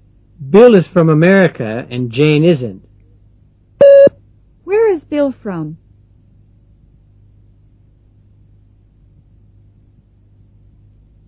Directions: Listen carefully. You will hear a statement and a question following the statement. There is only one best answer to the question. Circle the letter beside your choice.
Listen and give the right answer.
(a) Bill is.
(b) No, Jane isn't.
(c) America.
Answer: (c) America.

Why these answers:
Bill is from America and Jane isn't.

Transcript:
7.Bill is from America and Jane isn't. Where is Bill from? (c)